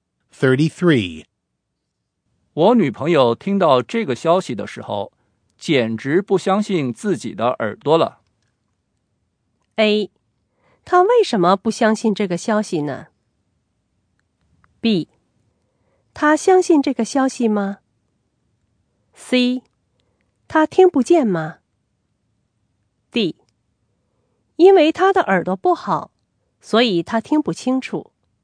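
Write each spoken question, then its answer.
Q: 我女朋友听到这个消息的时候,简直不相信自己的耳朵了。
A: A: 她为什么不相信这个消息呢?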